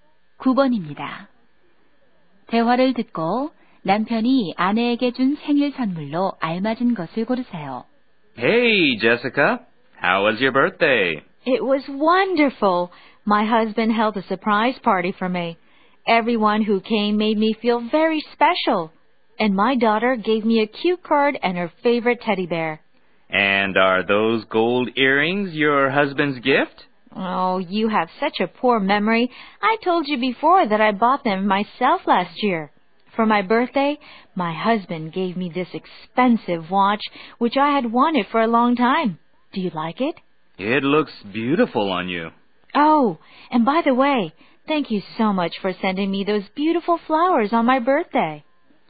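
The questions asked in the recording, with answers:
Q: 대화를 듣고 남편이 아내에게 준 생일 선물로 알맞은 것을 고르세요.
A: 시계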